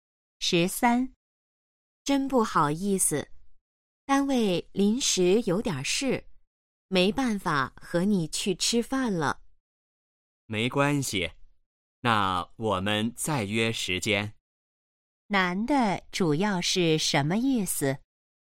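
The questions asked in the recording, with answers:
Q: 男的主要是什么意思?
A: 不能一起去吃饭了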